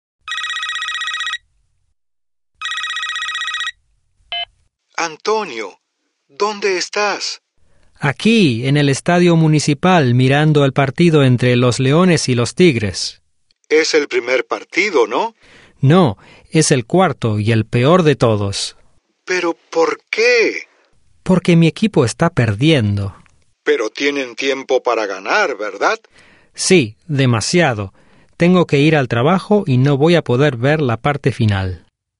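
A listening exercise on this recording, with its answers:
What is Antonio doing when Raul calls him?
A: Watching a series of sports matches.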